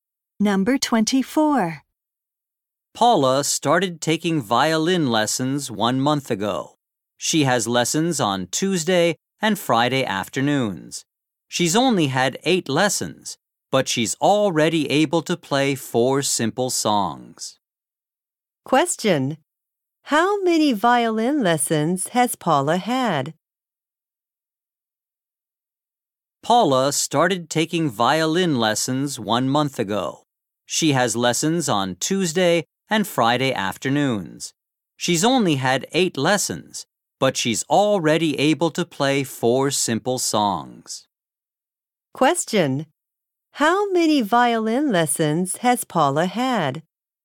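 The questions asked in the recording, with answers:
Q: How many violin lessons has Paula had?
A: Eight.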